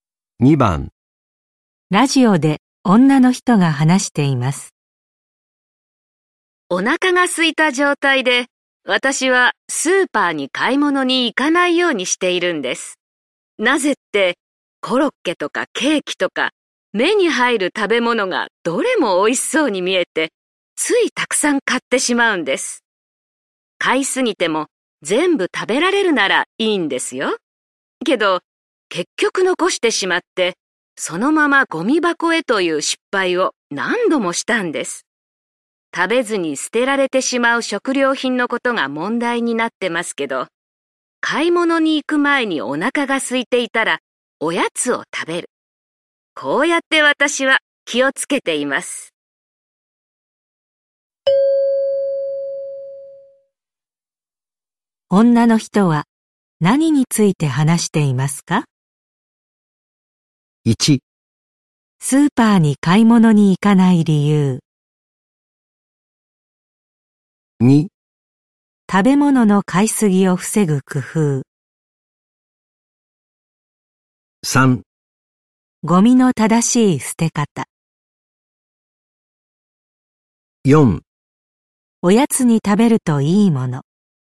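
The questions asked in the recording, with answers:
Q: 女の人は何について話していますか?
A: 2: 食べ物の買いすぎを防ぐ工夫。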